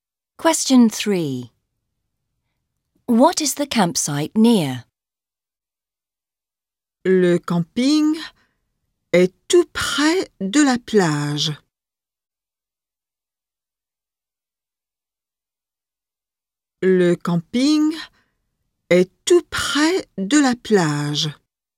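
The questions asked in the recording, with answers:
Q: What is the campsite near?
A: The beach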